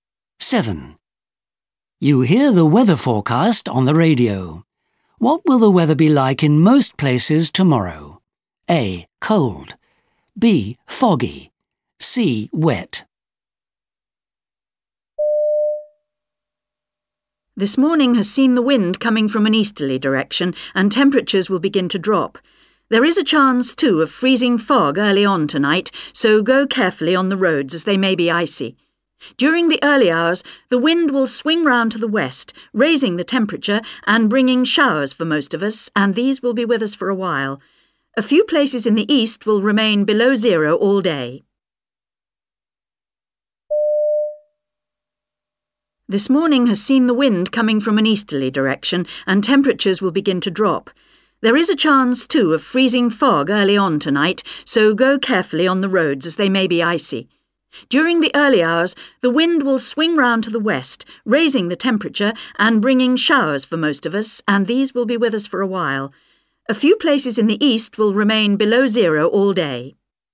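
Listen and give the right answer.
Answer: C: Wet.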